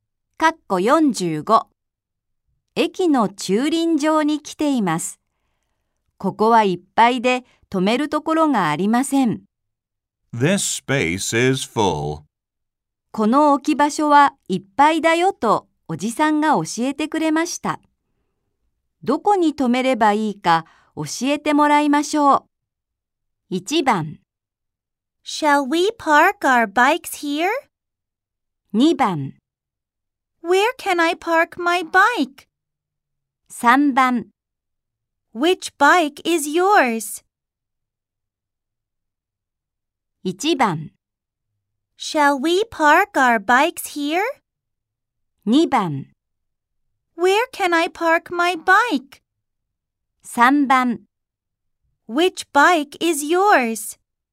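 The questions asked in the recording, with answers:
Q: どこに止めればいいか教えてもらいましょう。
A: 2: Where can I park my bike?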